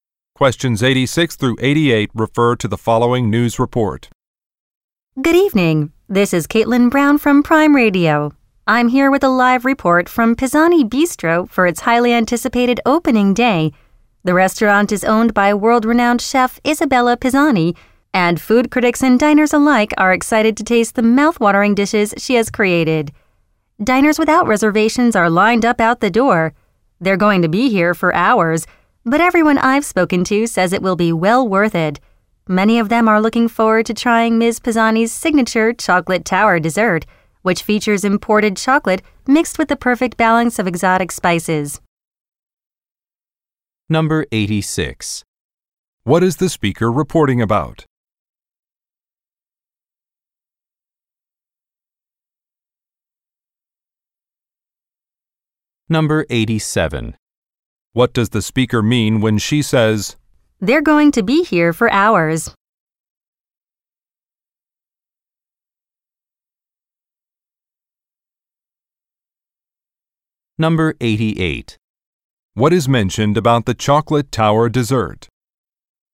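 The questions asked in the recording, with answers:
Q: What is the speaker reporting about?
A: The opening day of Pisani Bistro, a new restaurant

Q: "They're going to be here for hours"?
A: Diners without reservations face a long wait

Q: What is mentioned about the chocolate tower dessert?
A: It is made with imported chocolate and exotic spices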